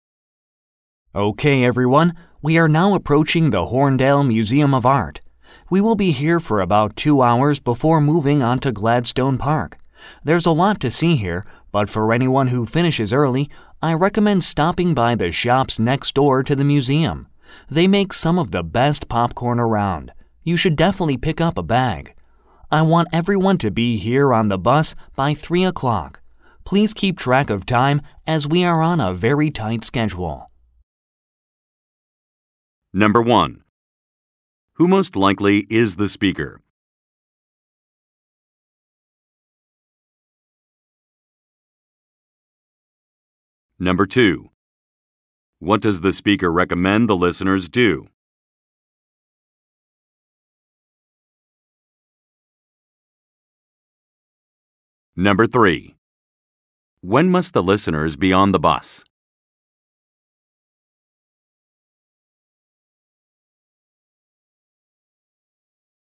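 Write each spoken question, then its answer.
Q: Who most likely is the speaker?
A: A tour guide

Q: What does the speaker recommend the listeners do?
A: Buy popcorn at the shops next door to the museum

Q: When must the listeners be on the bus?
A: By 3 o'clock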